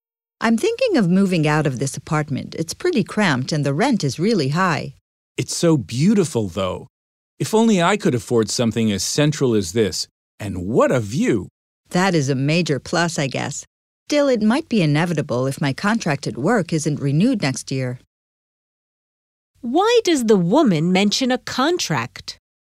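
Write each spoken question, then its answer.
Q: Why does the woman mention a contract?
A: She may have to move out if her work contract isn't renewed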